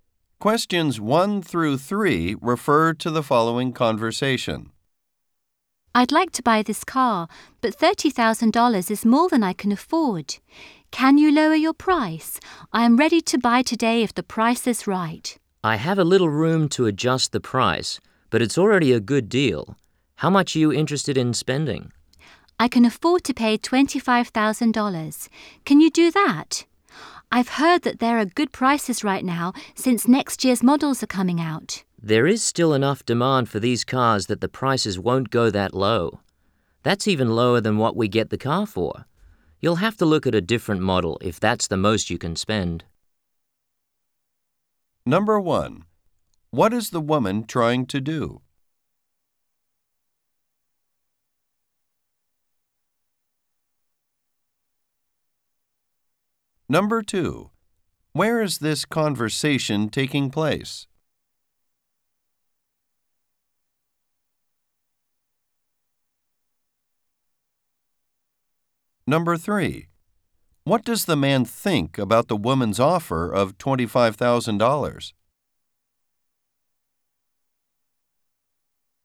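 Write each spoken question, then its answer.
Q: What is the woman trying to do?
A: Buy a car at a lower price

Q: Where is this conversation taking place?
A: At a car dealership

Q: What does the man think about the woman's offer of $25,000?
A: It is too low, lower than what the dealer paid for the car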